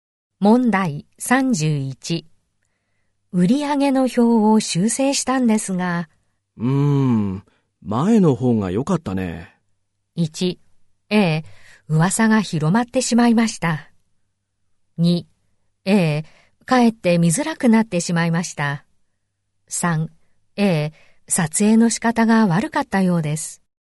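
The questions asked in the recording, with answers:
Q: 前の方が良かったね。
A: 2: ええ、かえって見づらくなってしまいました。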